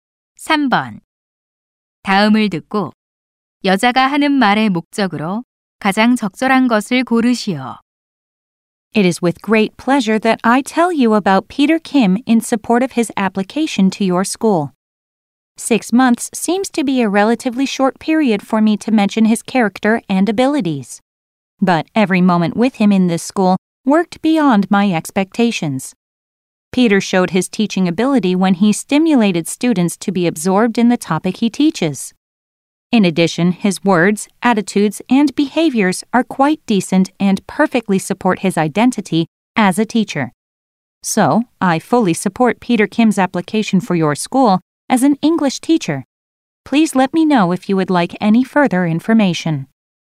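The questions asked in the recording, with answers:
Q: 다음을 듣고 여자가 하는 말의 목적으로 가장 적절한 것을 고르시오.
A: Peter Kim을 영어 교사로 추천하려고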